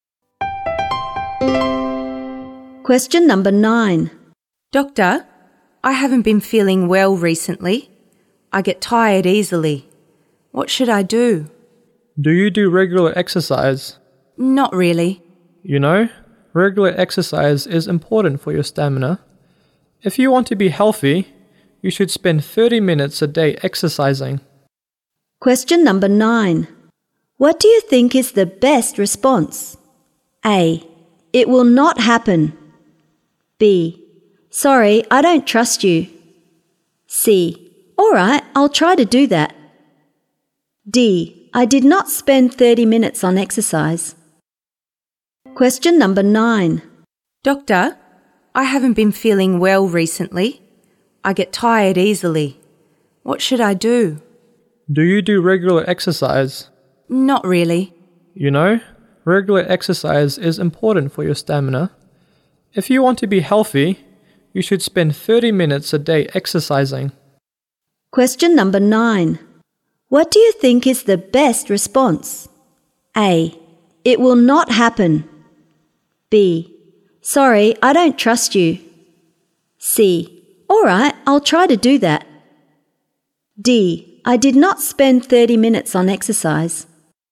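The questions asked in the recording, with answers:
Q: What do you think is the best response?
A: C: All right, I'll try to do that.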